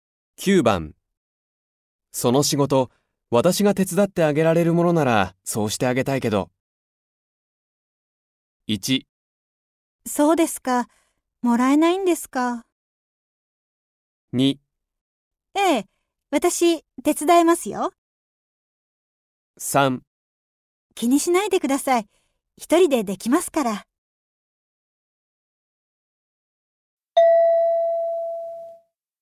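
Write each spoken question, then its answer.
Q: その仕事、私が手伝ってあげられるものなら、そうしてあげたいけど。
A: 3: 気にしないでください、一人でできますから。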